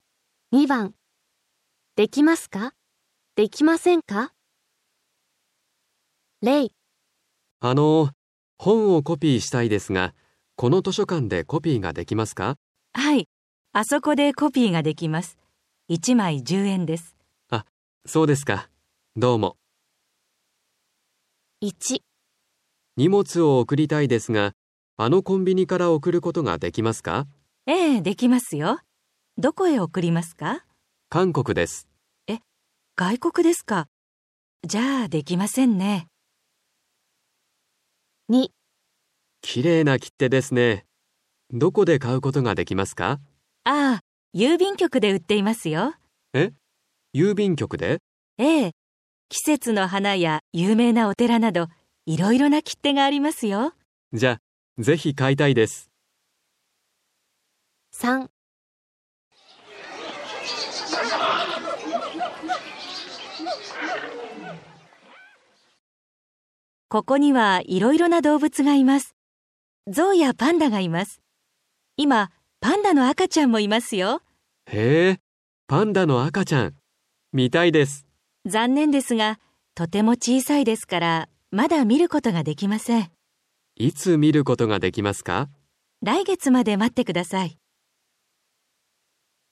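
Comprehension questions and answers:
2. できますか、できませんか。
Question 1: ( )外国へ 荷物を 送ります。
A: ✕

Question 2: ( )きれいな 切手を 買います。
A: 〇

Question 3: ( )今 パンダの 赤ちゃんを 見ます。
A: ✕

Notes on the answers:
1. B: え、 外国ですか、 じゃ、 出来ませんね。
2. B: ああ、 郵便局で 売っていますよ。
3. A: 残念ですが、 とても 小さいですから、 まだ みることが できません。

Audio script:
2. できますか、できませんか。
A: あのう、 本を コピーしたいですが、
この 図書館で コピーが できますか。
B: はい、 あそこで コピーが できます。1枚10円です。
A: あ、 そうですか。 どうも。
2. 1
A: 荷物を 送りたいですが、
あの コンビニから 送ることができますか。
B: ええ、 できますよ。 どこへ 送りますか。
A: 韓国です。
B: え、 外国ですか、 じゃ、 出来ませんね。
2. 2
A: きれいな 切手ですね。 どこで 買うことができますか。
B: ああ、 郵便局で 売っていますよ。
B: ええ、 季節の 花や 有名な お寺など、
いろいろな切手が ありますよ。
A: じゃ、 ぜひ 買いたいです。
2. 3
A: ここには、 いろいろな 動物が います。
像や パンダがいます。 今、 パンダの 赤ちゃんも いますよ。
B: へえ、 パンダの 赤ちゃん! 見たいです。
A: 残念ですが、 とても 小さいですから、
A: 来月まで 持って ください。

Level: N5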